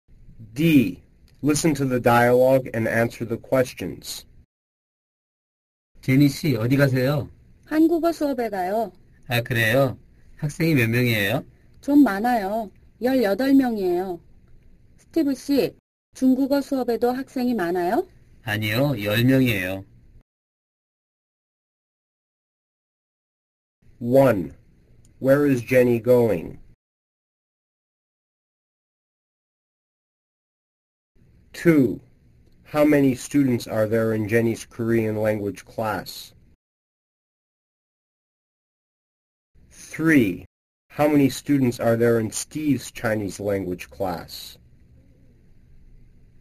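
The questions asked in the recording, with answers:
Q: Where is Jenny going?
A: To Korean class

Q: How many students are there in Jenny's Korean language class?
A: 18

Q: How many students are there in Steve's Chinese language class?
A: 10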